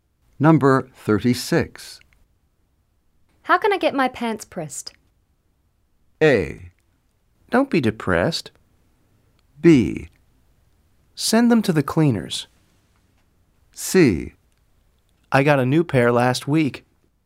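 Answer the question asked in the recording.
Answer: B: Send them to the cleaners.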